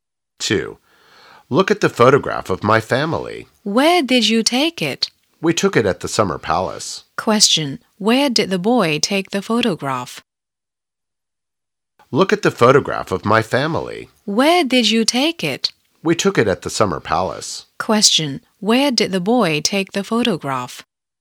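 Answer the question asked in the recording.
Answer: At the Summer Palace.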